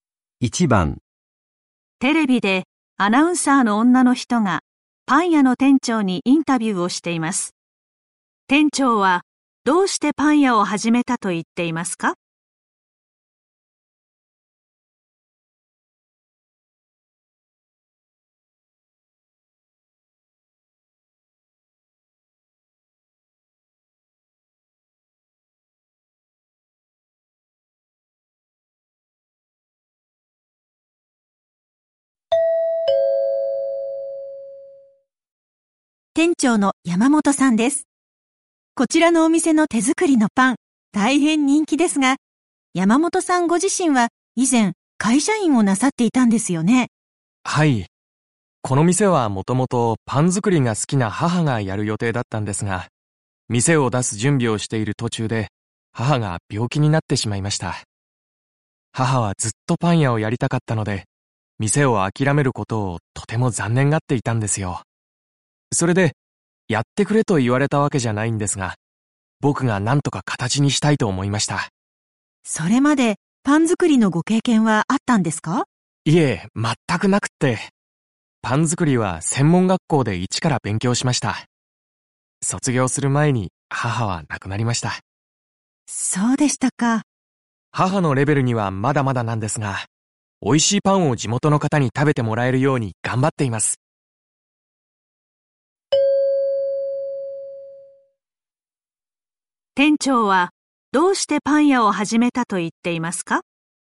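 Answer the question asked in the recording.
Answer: パン屋をやりたかった母の思いを形にしたかったから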